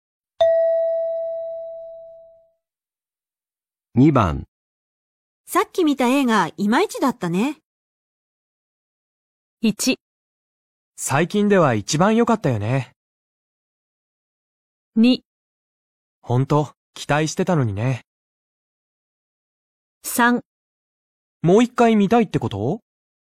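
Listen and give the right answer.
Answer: 2: 本当、期待してたのにね。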